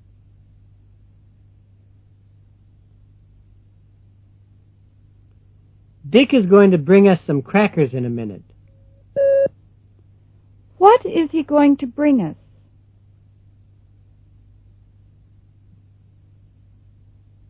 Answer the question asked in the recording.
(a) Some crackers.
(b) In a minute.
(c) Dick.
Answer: (a) Some crackers.

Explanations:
Dick is going to bring us some crackers in a minute. What is he going to bring us?

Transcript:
6.Dick is going to bring us some crackers in a minute. What is he going to bring us?